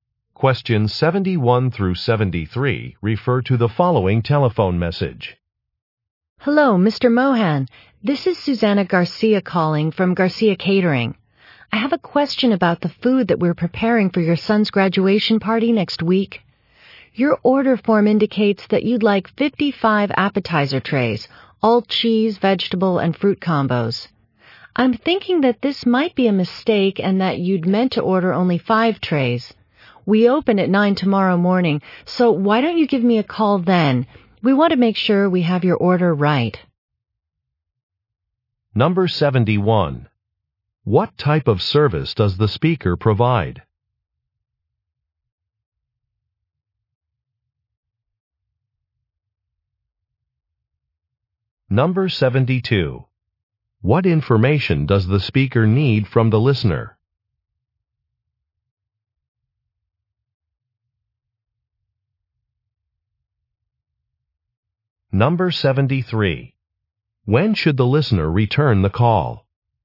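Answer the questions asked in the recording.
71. Catering
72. The correct number of appetizer trays he wants to order
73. Tomorrow morning, after 9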